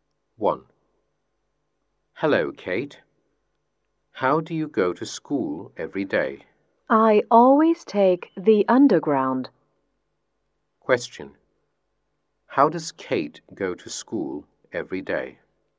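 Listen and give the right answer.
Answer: By underground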